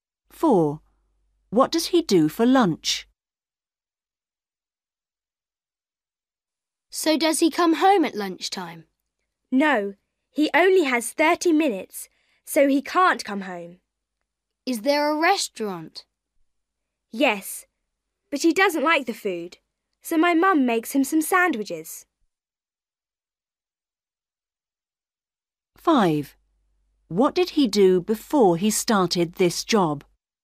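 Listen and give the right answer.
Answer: eats sandwiches his mum makes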